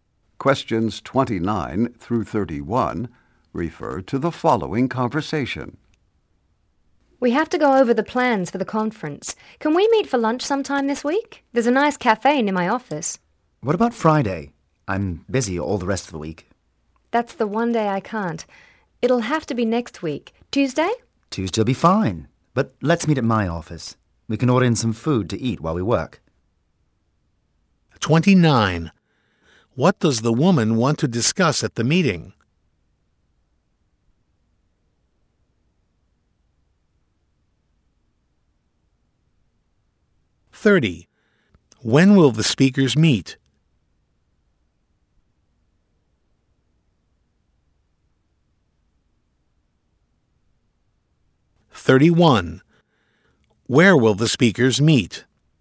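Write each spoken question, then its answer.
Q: What does the woman want to discuss at the meeting?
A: The plans for the conference

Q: When will the speakers meet?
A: Next Tuesday

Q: Where will the speakers meet?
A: At the man's office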